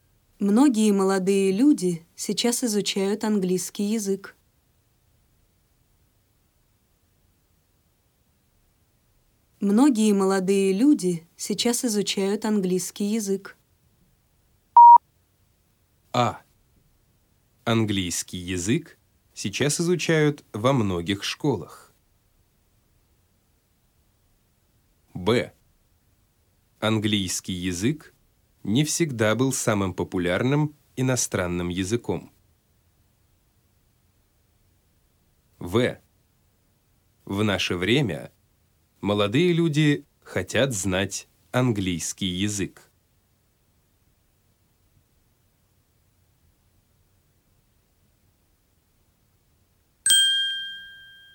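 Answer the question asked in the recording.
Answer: В: В наше время молодые люди хотят знать английский язык.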